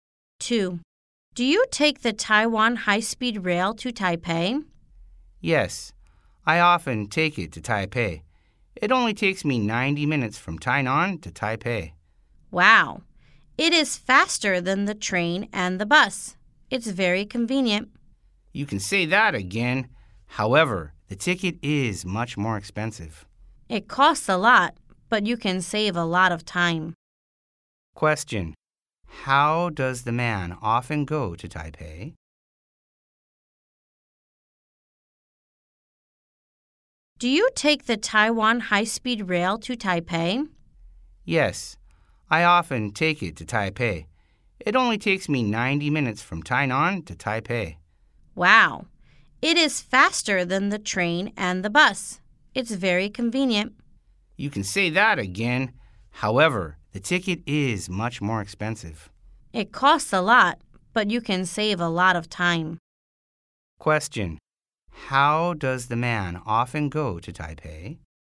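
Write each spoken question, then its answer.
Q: How does the man often go to Taipei?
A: By Taiwan high-speed rail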